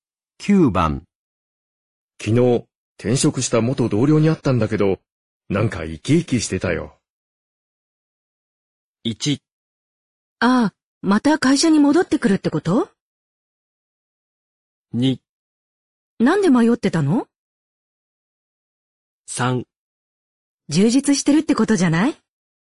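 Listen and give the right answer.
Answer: 3: 充実してるってことじゃない?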